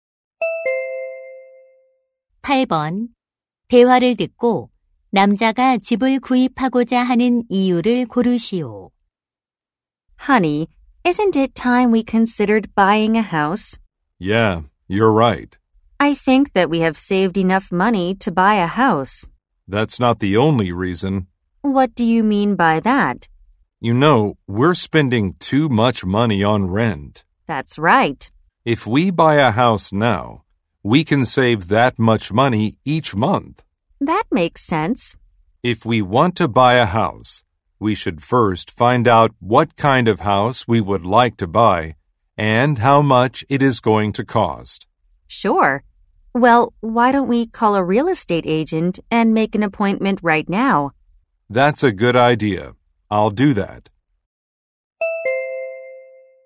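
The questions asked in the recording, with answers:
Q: 대화를 듣고 남자가 집을 구입하고자 하는 이유를 고르시오.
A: 집세에 너무 많은 돈을 쓰고 있어서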